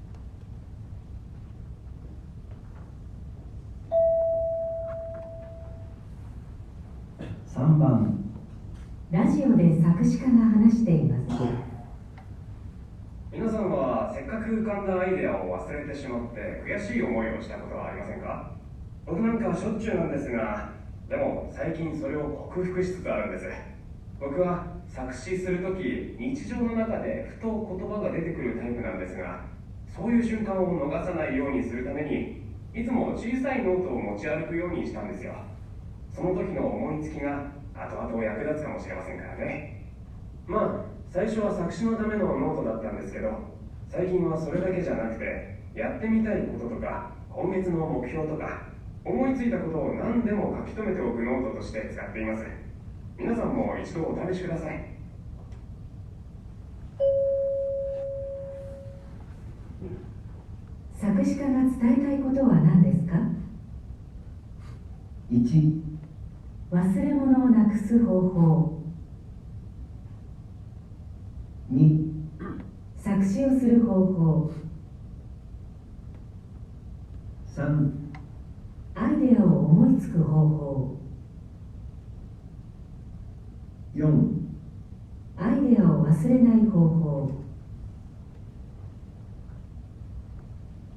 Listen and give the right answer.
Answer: 4

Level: N1 Listening · Test 2